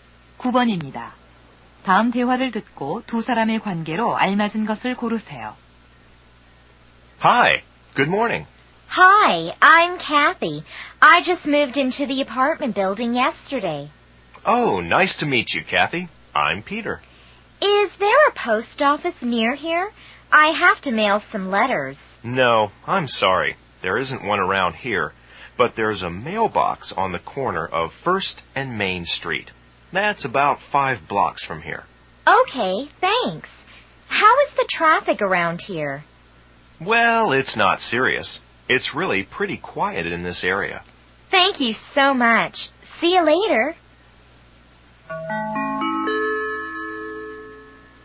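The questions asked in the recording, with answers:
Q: 다음 대화를 듣고 두 사람의 관계로 알맞은 것을 고르세요.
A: 이웃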